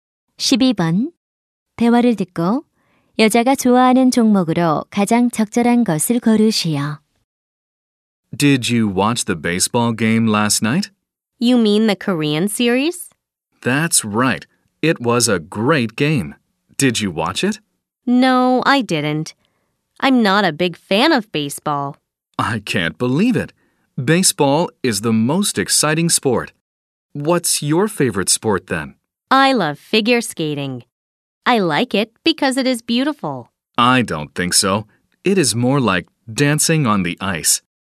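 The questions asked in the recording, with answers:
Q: 대화를 듣고 여자가 좋아하는 종목으로 가장 적절한 것을 고르시오.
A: 피겨 스케이팅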